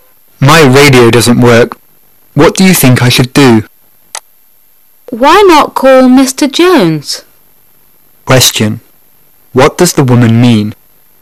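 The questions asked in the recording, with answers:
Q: What does the woman mean?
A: He should call Mr. Jones to fix the radio.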